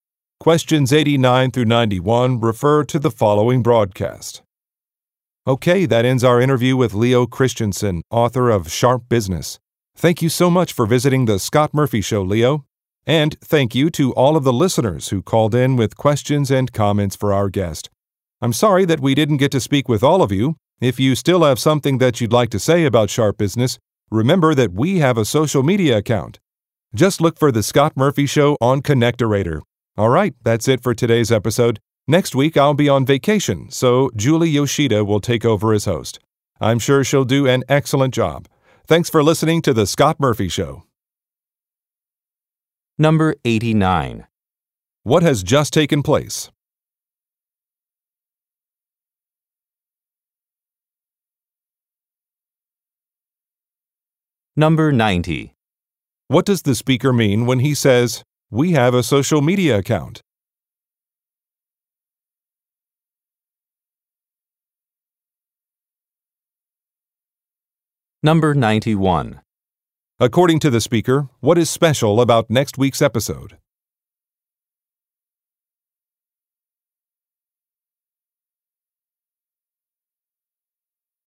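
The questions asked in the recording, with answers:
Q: What has just taken place?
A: An interview with an author

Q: What does the speaker mean when he says, "We have a social media account"?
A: Listeners can leave their comments on social media

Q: According to the speaker, what is special about next week's episode?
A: A different host (Julie Yoshida) will present it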